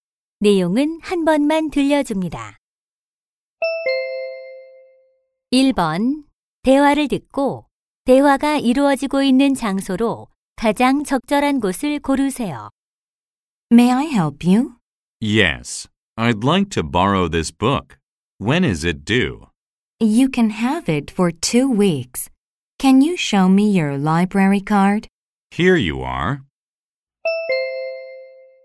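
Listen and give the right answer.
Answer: 도서관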